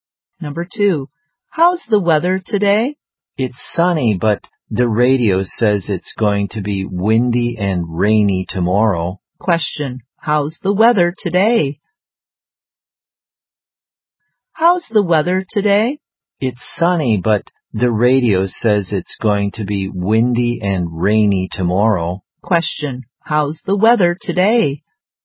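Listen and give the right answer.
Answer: Sunny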